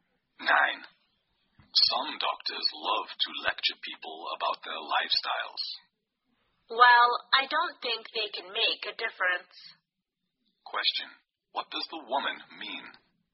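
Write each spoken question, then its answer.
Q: What does the woman mean?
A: Doctors' lectures on lifestyle don't change people's habits.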